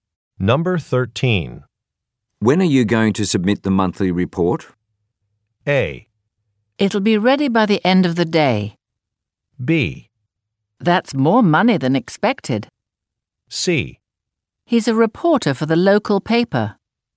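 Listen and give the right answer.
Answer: A: It'll be ready by the end of the day.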